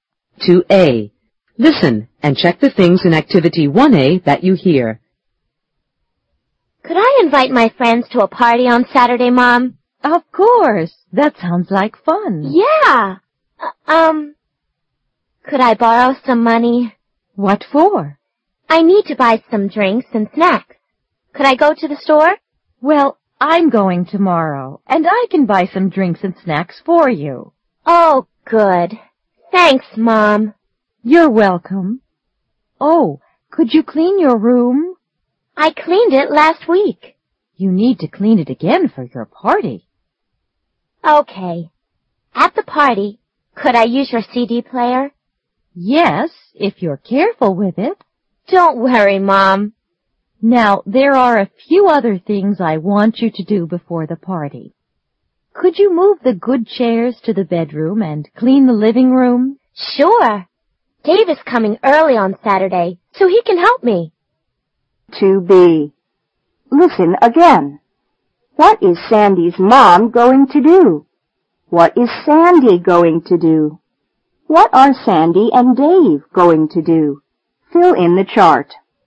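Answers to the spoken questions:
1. Go to the store and buy drinks and snacks
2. Clean her room
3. Move the good chairs to the bedroom and clean the living room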